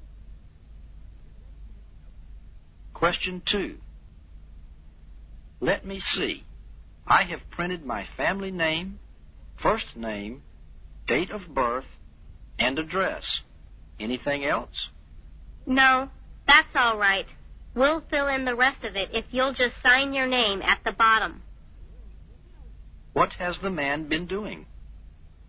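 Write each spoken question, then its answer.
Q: What has the man been doing?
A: Filling out a form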